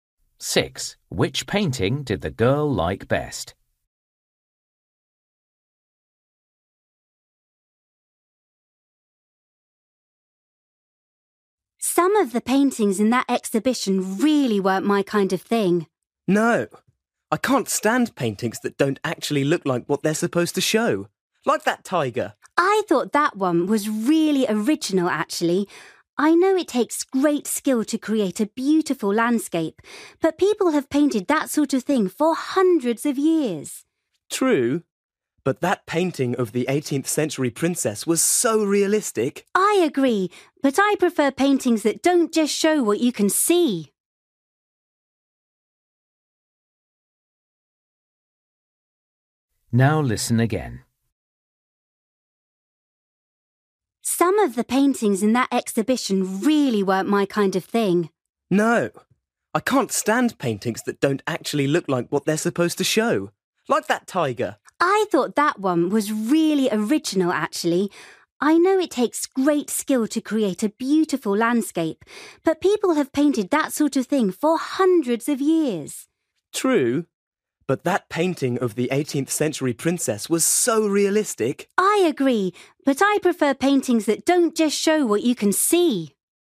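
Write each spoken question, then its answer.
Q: Which painting did the girl like best?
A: The tiger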